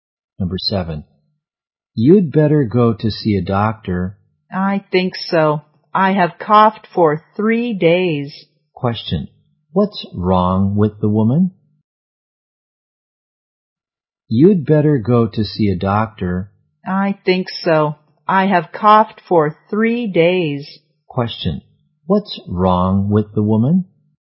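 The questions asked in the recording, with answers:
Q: What's wrong with the woman?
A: She has a cough (for 3 days)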